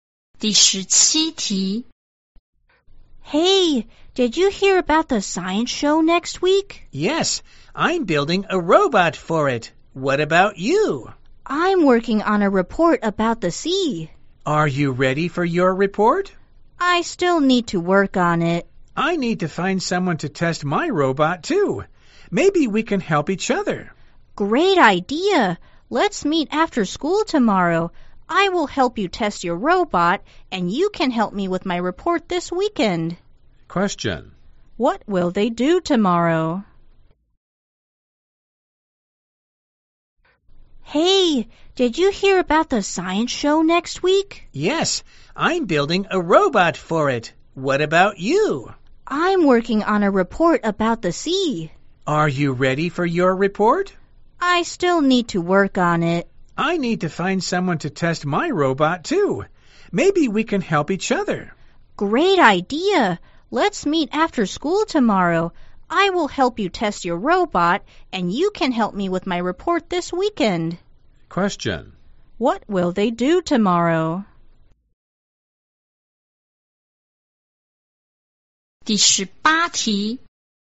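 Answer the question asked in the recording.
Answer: Test the robot after school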